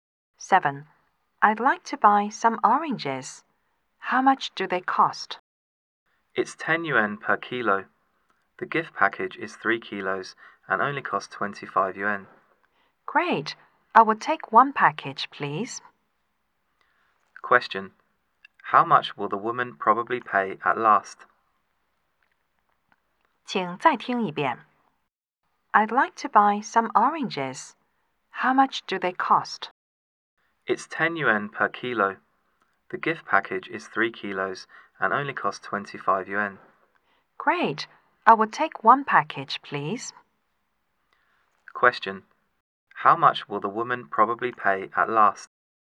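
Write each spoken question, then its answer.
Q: How much will the woman probably pay at last?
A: 25 yuan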